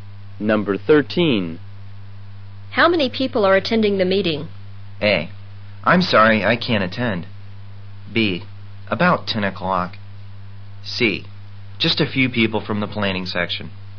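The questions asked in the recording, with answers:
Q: How many people are attending the meeting?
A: C: Just a few people from the planning section.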